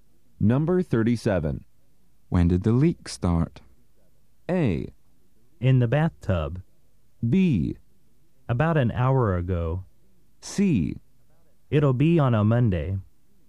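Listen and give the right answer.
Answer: B: About an hour ago.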